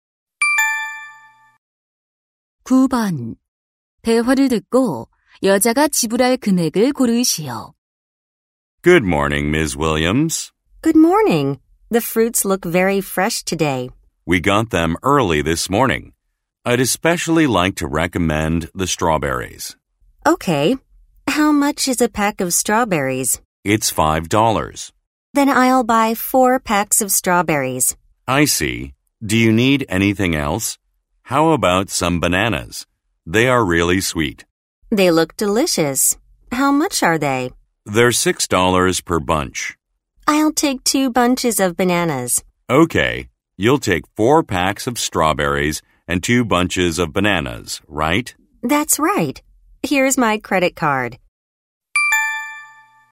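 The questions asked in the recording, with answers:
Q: 대화를 듣고 여자가 지불할 금액을 고르시오.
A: $32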